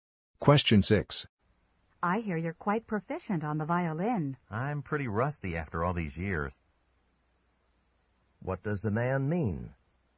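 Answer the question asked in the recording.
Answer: He hasn't played the violin in years, so he's out of practice.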